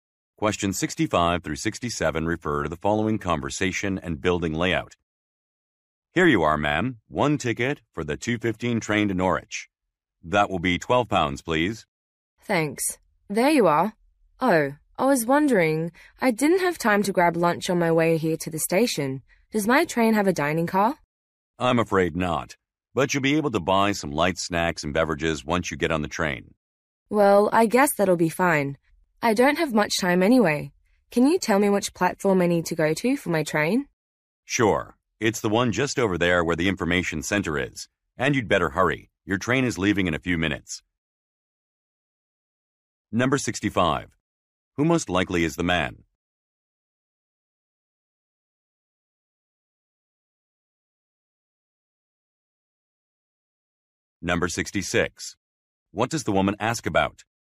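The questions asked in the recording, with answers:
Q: Who most likely is the man?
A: A ticket agent at a train station

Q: What does the woman ask about?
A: Whether the train has a dining car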